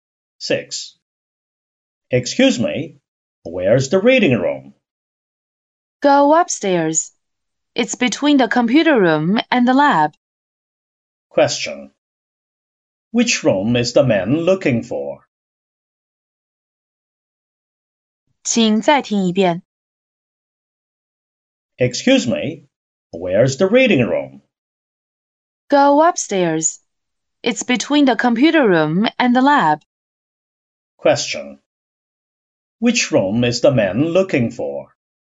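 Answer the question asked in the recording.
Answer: The reading room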